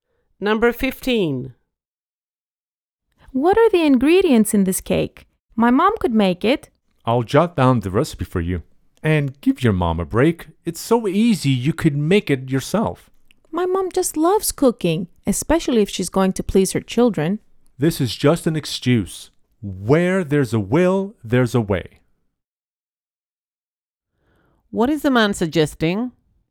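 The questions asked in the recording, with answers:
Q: What is the man suggesting?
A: The woman should make the cake herself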